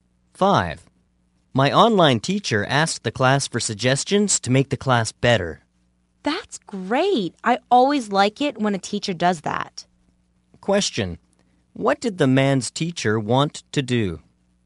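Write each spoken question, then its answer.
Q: What did the man's teacher want to do?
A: Get suggestions to make the class better.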